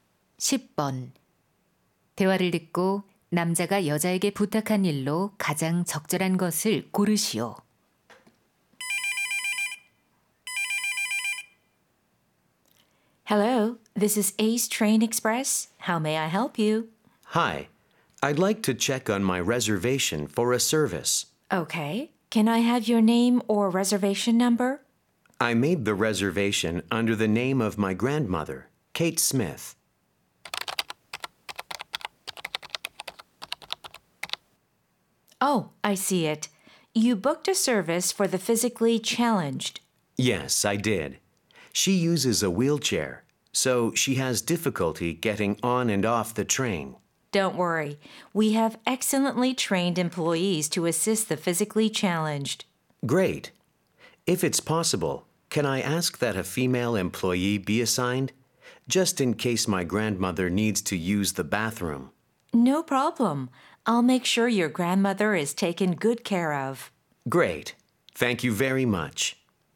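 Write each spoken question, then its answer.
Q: 대화를 듣고 남자가 여자에게 부탁한 일로 가장 적절한 것을 고르시오.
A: 할머니를 도울 여자 직원 배정하기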